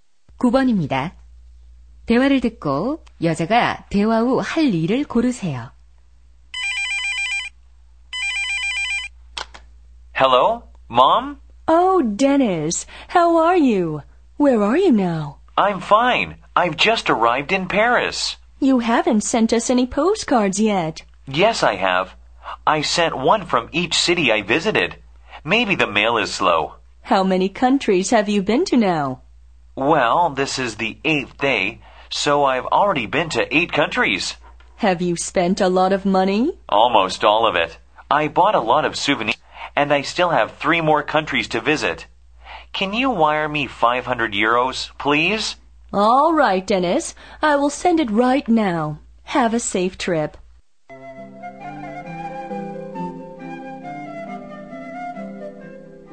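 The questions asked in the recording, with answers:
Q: 대화를 듣고 여자가 대화 후 할 일을 고르세요.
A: 아들에게 500유로 송금하기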